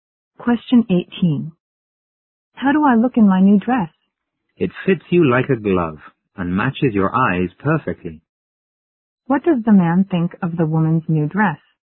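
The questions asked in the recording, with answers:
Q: What does the man think of the woman's new dress?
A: It fits her perfectly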